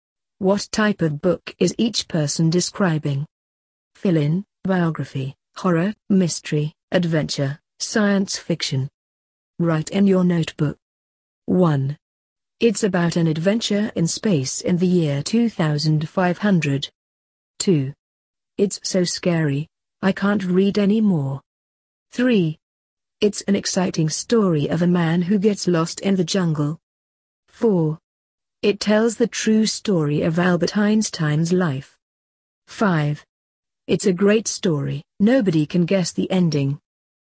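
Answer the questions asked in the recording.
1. science fiction
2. horror
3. adventure
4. biography
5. mystery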